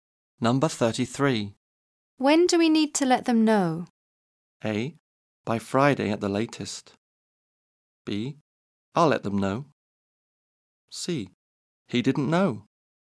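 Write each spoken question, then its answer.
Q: When do we need to let them know?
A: A: By Friday at the latest.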